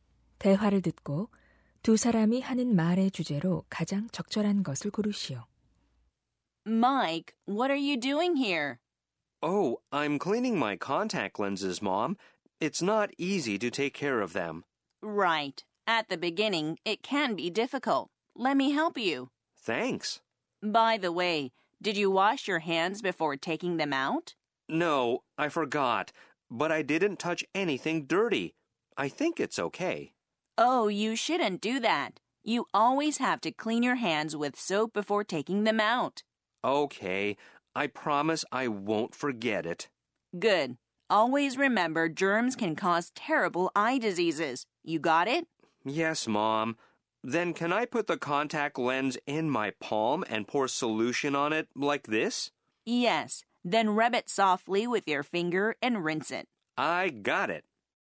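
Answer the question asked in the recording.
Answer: 콘택트렌즈를 관리하는 올바른 방법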